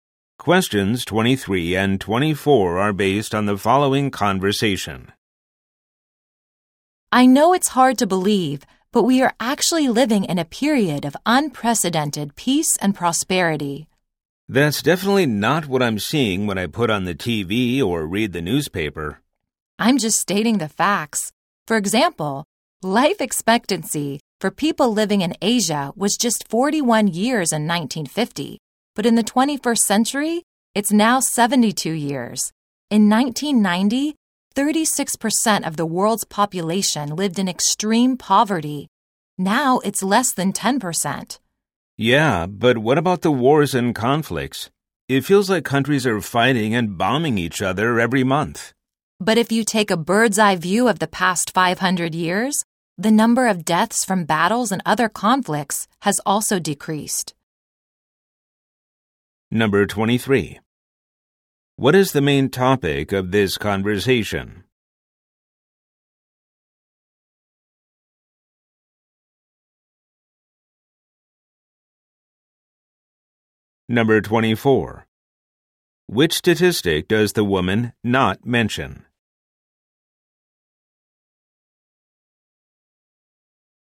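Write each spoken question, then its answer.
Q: What is the main topic of this conversation?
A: The world is living in a period of unprecedented peace and prosperity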